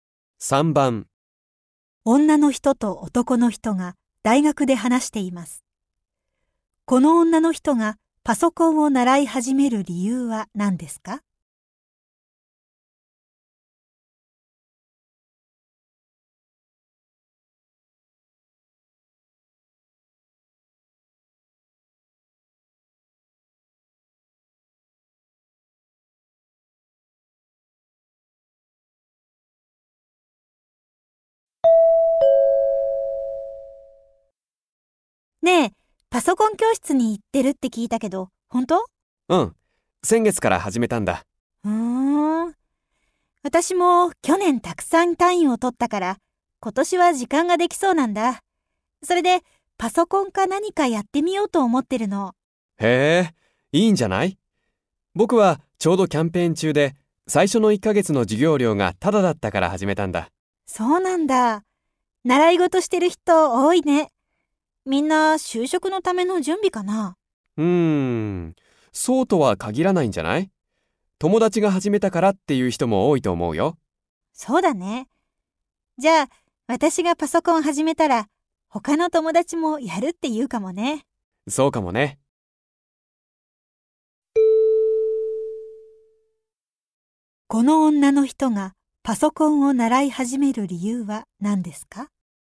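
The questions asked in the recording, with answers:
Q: この女の人がパソコンを習い始める理由は何ですか?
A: 単位をたくさん取って時間ができたから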